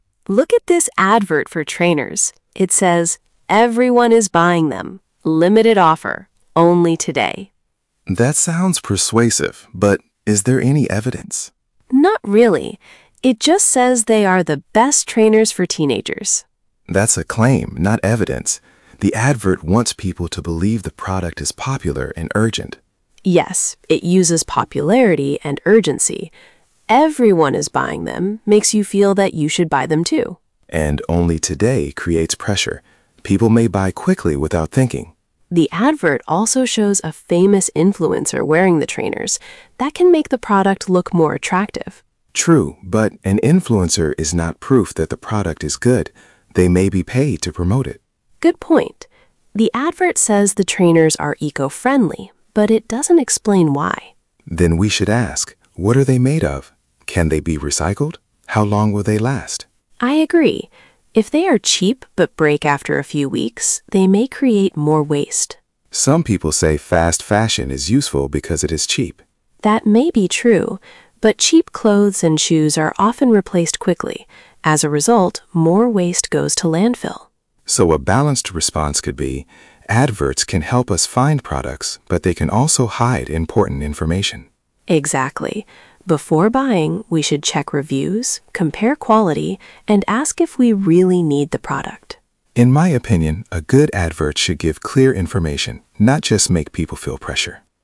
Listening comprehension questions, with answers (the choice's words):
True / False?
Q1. The advert gives clear evidence that the trainers are the best.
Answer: False

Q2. "Only today" creates pressure.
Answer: True

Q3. Leo says influencers always prove that a product is good.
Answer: False

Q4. The advert explains why the trainers are eco-friendly.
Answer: False

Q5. Mia says cheap products may create more waste if they break quickly.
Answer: True

Przeczytaj pytania, a potem posłuchaj i wybierz właściwą odpowiedź.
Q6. What are Mia and Leo talking about?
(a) a school uniform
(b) an advert for trainers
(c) a recycling project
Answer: an advert for trainers

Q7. What is their main opinion about the advert?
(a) It gives strong evidence.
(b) It is persuasive, but people should check it critically.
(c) It is not about shopping.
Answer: It is persuasive, but people should check it critically.

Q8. What should customers do before buying?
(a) buy immediately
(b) check reviews and think if they need the product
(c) ignore all adverts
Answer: check reviews and think if they need the product

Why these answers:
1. it only makes a claim, with no evidence.
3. he says an influencer is not proof.
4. it doesn't explain why.

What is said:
Mia: Look at this advert for trainers. It says, "Everyone is buying them. Limited offer — only today!"
Leo: That sounds persuasive, but is there any evidence?
Mia: Not really. It just says they are the best trainers for teenagers.
Leo: That's a claim, not evidence. The advert wants people to believe the product is popular and urgent.
Mia: Yes, it uses popularity and urgency. "Everyone is buying them" makes you feel that you should buy them too.
Leo: And "only today" creates pressure. People may buy quickly without thinking.
Mia: The advert also shows a famous influencer wearing the trainers. That can make the product look more attractive.
Leo: True, but an influencer is not proof that the product is good. They may be paid to promote it.
Mia: Good point. The advert says the trainers are eco-friendly, but it doesn't explain why.
Leo: Then we should ask: What are they made of? Can they be recycled? How long will they last?
Mia: I agree. If they are cheap but break after a few weeks, they may create more waste.
Leo: Some people say fast fashion is useful because it is cheap.
Mia: That may be true, but cheap clothes and shoes are often replaced quickly. As a result, more waste goes to landfill.
Leo: So a balanced response could be: adverts can help us find products, but they can also hide important information.
Mia: Exactly. Before buying, we should check reviews, compare quality and ask if we really need the product.
Leo: In my opinion, a good advert should give clear information, not just make people feel pressure.

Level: A2+/B1